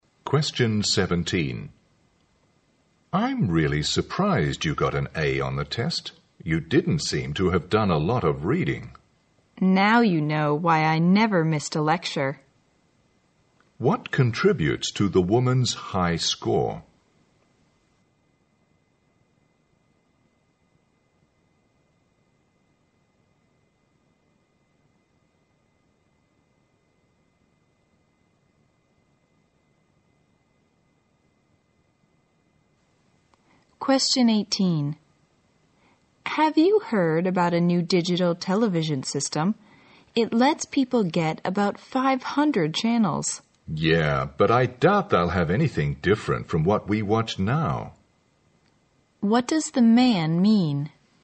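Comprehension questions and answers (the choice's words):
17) What contributes to the woman's high score?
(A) Attending every lecture.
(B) Doing lots of homework.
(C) Reading very extensively.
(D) Using test-taking strategies.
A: Attending every lecture.

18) What does the man mean?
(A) The digital TV system will offer different programs.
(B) He is eager to see what the new system is like.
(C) He thinks it unrealistic to have 500 channels.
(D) The new TV system may not provide anything better.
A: The new TV system may not provide anything better.

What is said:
M: I'm really surprised you got an "A" on the test. You didn't seem to have done a lot of reading.
W: Now you know why I never missed a lecture.
Q: What contributes to the woman's high score?
W: Have you heard about a new digital television system? It lets people get about 500 channels.
M: Yeah, but I doubt they'll have anything different from what we watch now.
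Q: What does the man mean?

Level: 大学英语四级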